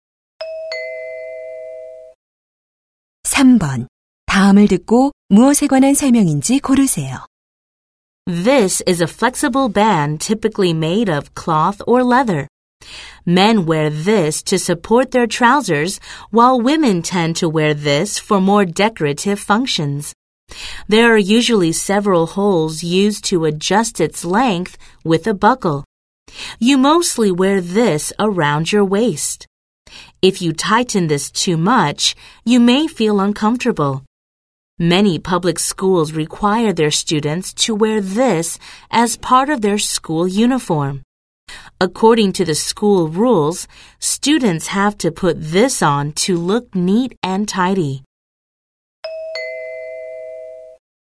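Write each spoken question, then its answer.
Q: 다음을 듣고 무엇에 관한 설명인지 고르세요.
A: 벨트 (허리띠)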